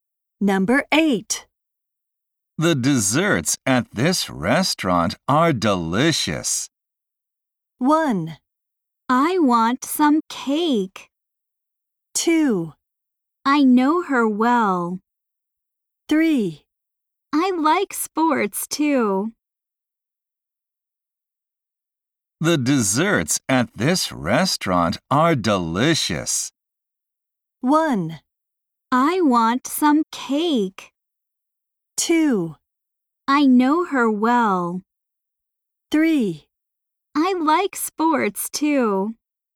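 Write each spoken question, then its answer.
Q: The desserts at this restaurant are delicious.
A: 1: I want some cake.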